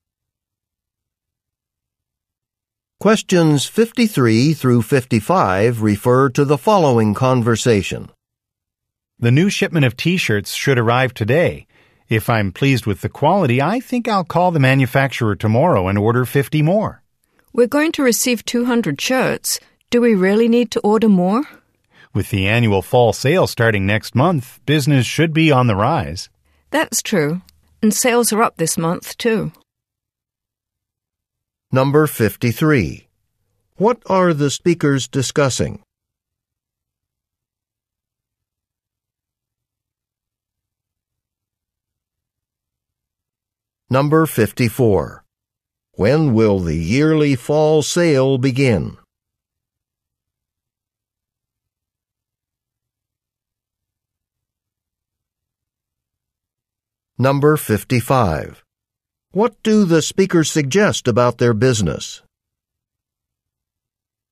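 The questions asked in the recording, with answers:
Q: What are the speakers discussing?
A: Ordering more T-shirts

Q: When will the yearly fall sale begin?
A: Next month

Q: What do the speakers suggest about their business?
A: Sales are increasing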